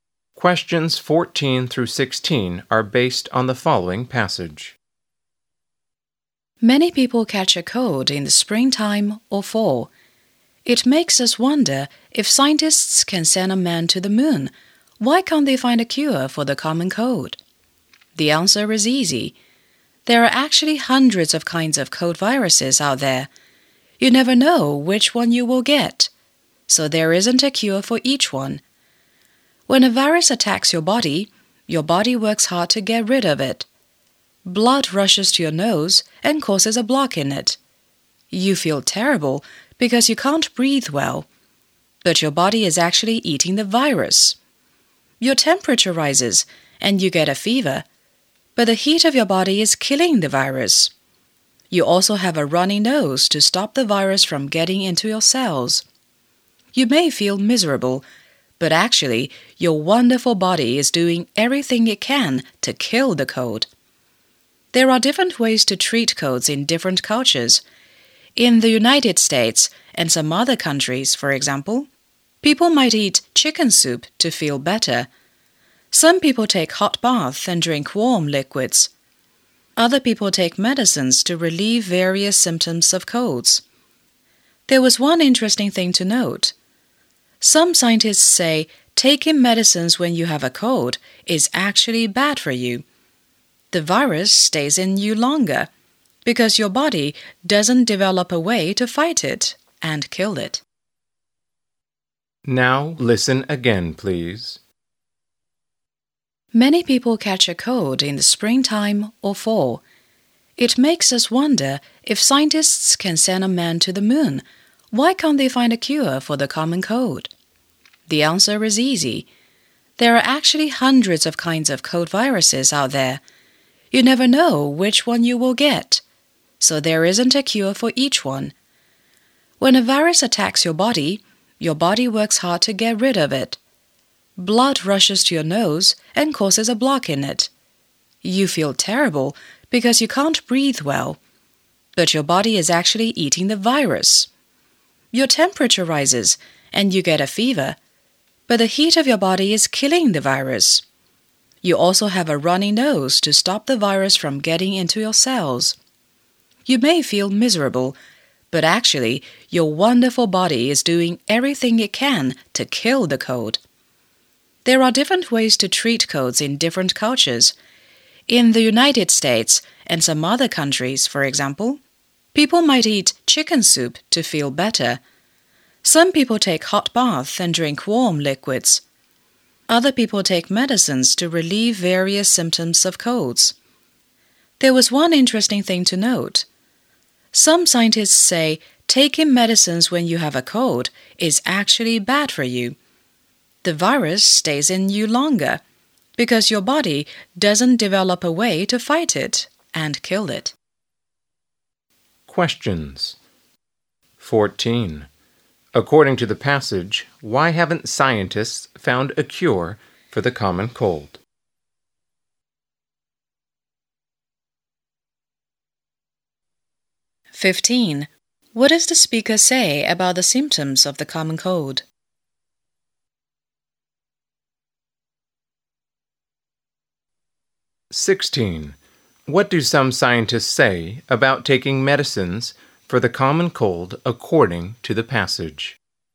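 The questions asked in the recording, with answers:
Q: According to the passage, why haven't scientists found a cure for the common cold?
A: There are hundreds of kinds of cold viruses

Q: What does the speaker say about the symptoms of the common cold?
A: They show the body is fighting the virus

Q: What do some scientists say about taking medicines for the common cold according to the passage?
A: It is bad for you; the virus stays longer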